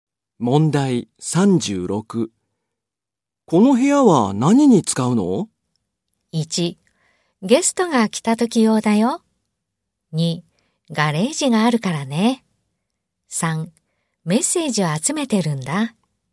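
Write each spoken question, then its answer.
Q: この部屋は何に使うの?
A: 1: ゲストが来た時用だよ。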